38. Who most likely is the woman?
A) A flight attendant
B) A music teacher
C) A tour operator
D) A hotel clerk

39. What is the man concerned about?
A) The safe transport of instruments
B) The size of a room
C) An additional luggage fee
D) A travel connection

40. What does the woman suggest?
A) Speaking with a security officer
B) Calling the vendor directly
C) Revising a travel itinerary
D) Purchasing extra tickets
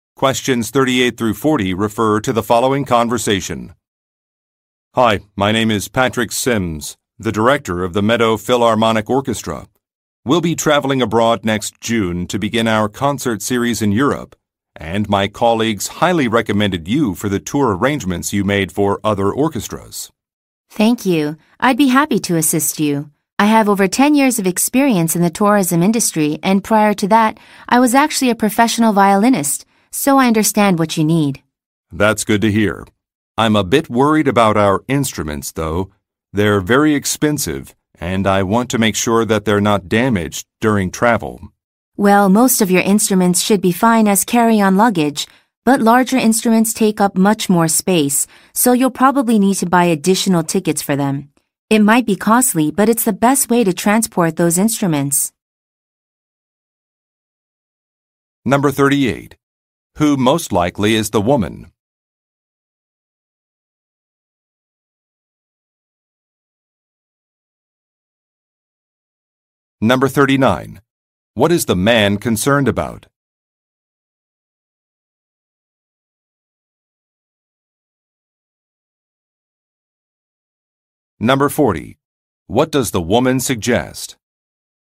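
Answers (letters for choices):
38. C
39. A
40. D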